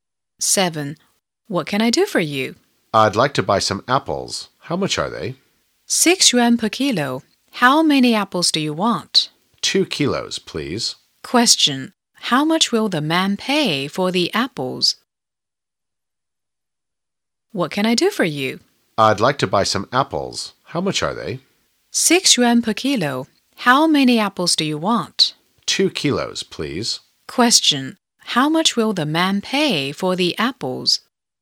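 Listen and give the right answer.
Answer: 12 yuan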